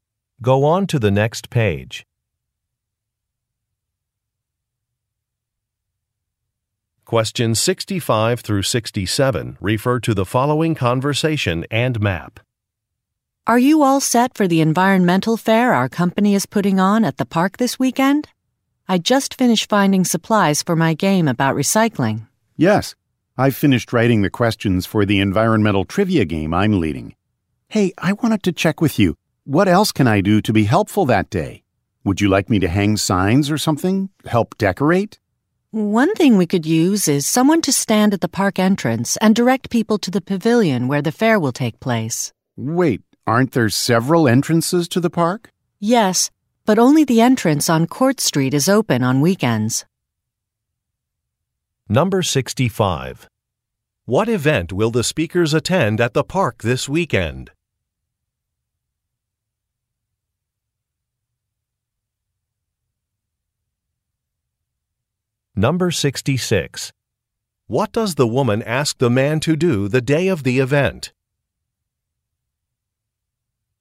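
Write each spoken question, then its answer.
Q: What event will the speakers attend at the park this weekend?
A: An environmental fair

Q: What does the woman ask the man to do the day of the event?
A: Stand at the park entrance and direct people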